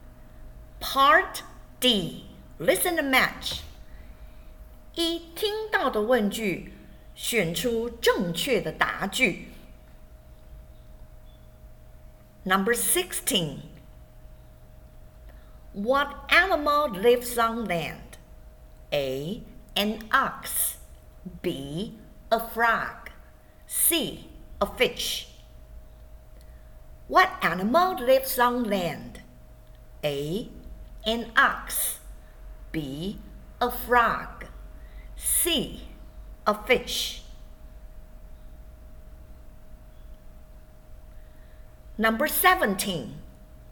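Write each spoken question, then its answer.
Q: What animal lives on land?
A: A: An ox.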